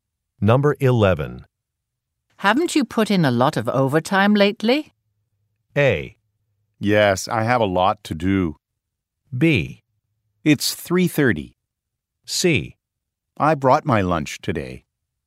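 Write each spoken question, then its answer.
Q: Haven't you put in a lot of overtime lately?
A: A: Yes, I have a lot to do.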